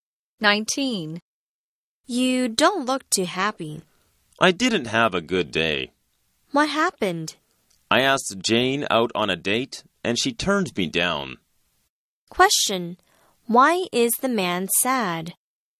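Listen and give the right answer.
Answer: Jane turned down his request for a date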